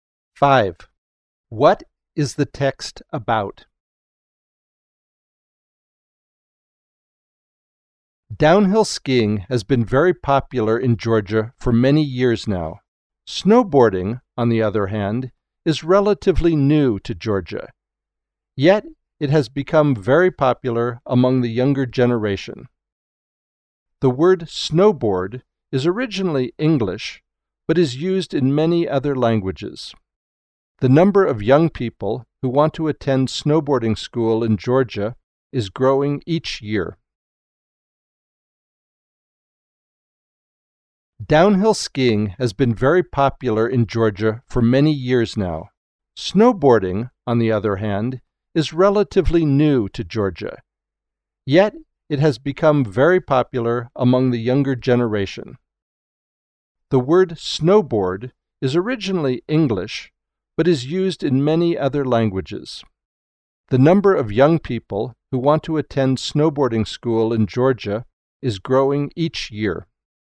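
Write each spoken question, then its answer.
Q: What is the text about?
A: The growing popularity of snowboarding in Georgia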